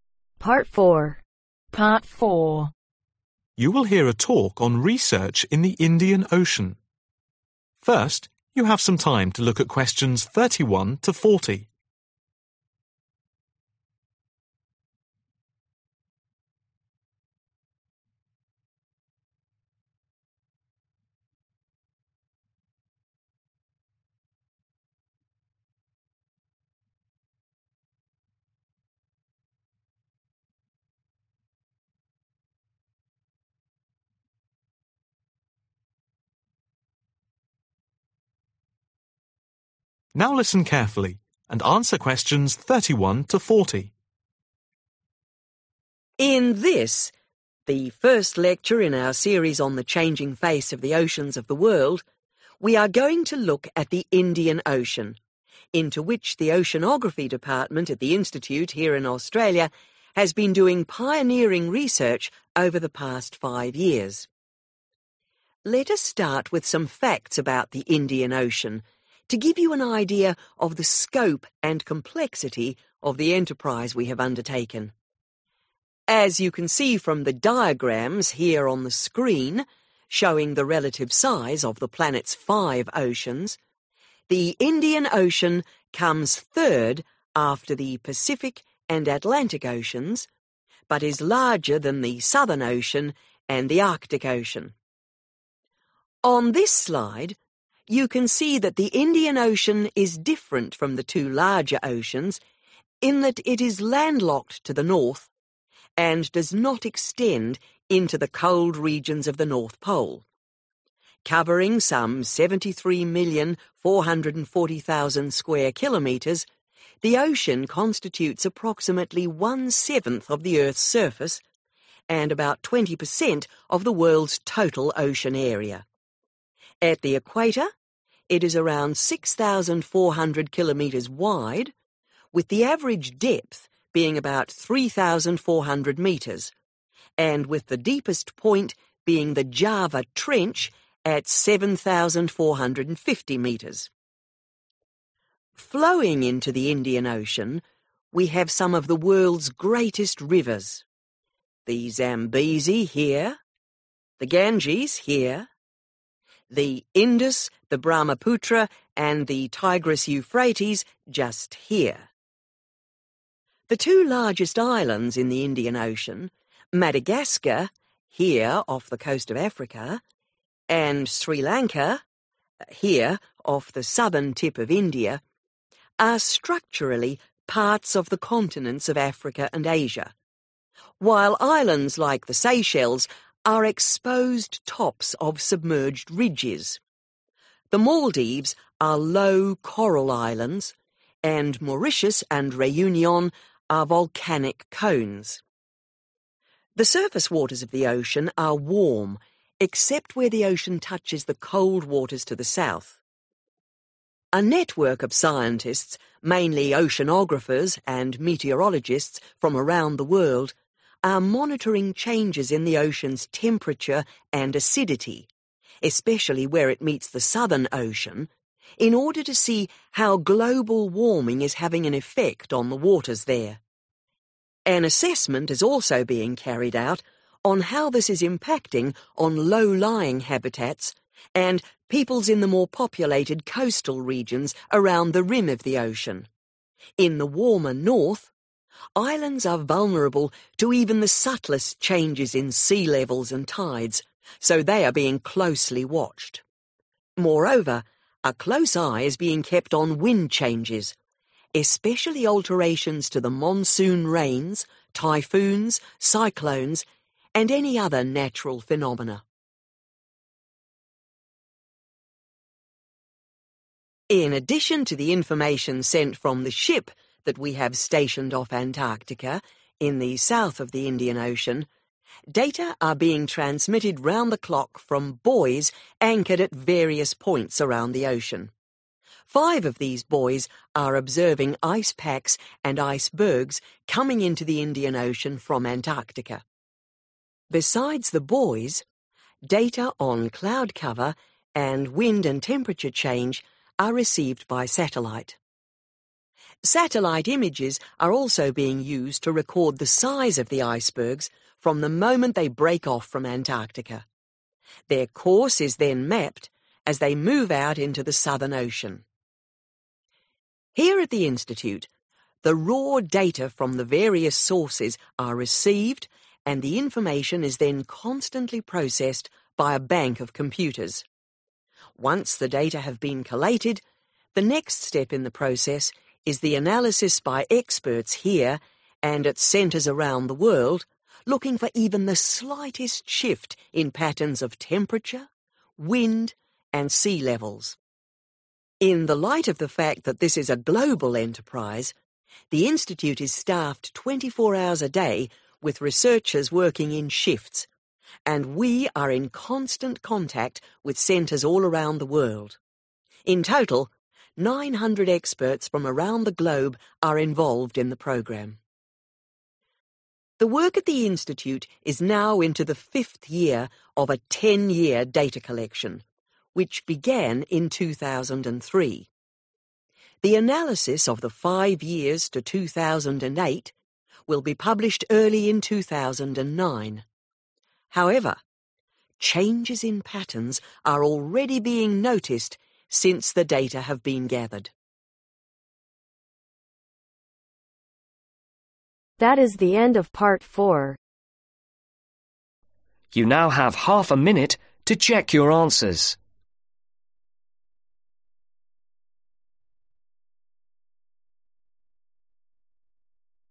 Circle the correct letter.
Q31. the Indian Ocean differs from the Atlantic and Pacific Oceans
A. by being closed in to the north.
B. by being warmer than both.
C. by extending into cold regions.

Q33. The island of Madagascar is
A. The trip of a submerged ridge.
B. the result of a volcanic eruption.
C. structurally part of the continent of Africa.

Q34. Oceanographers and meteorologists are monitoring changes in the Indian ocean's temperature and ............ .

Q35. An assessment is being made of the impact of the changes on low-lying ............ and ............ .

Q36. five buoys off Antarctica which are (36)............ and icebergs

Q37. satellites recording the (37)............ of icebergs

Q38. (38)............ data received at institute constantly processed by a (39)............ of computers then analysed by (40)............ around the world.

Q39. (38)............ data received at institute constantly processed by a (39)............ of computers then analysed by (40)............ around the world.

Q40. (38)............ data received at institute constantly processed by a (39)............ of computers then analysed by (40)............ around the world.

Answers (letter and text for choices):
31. A. by being closed in to the north.
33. C. structurally part of the continent of Africa.
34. Acidity
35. Habitats, Peoples
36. Observing ice packs
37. Size
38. Raw
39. Bank
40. Experts/Centers